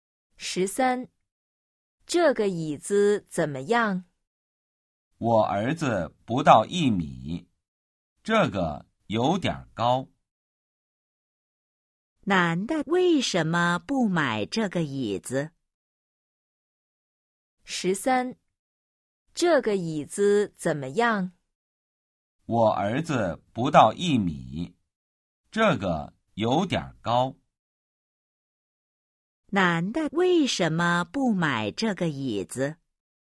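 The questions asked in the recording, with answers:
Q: 男的为什么不买这个椅子?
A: 椅子有点高(儿子不到一米)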